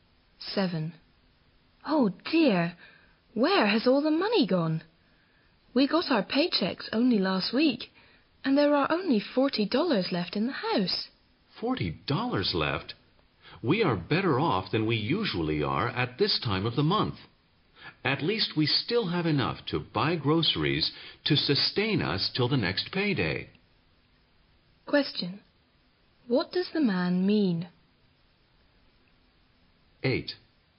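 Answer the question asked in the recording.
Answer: They are better off than usual at this time of the month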